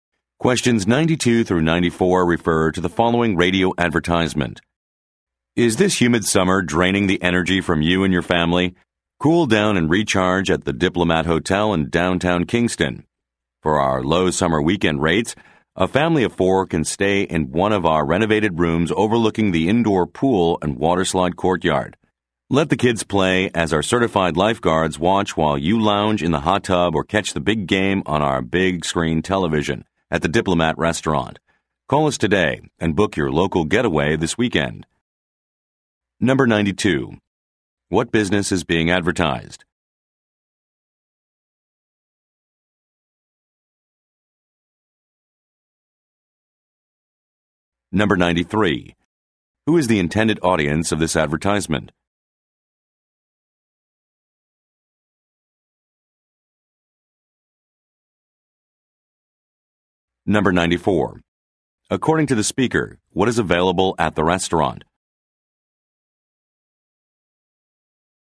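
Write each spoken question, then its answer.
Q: What business is being advertised?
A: A hotel

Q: Who is the intended audience of this advertisement?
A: Local families

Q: According to the speaker, what is available at the restaurant?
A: A big screen television for watching games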